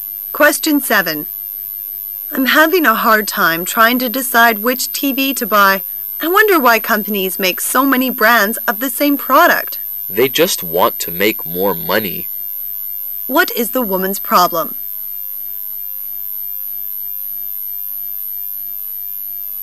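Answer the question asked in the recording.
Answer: She can't decide which TV to buy.

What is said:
[解析] W: I'm having a hard time trying to decide which TV to buy. I wonder why companies make so many brands of the same product? M: They just want to make more money. Q: What is the woman's problem?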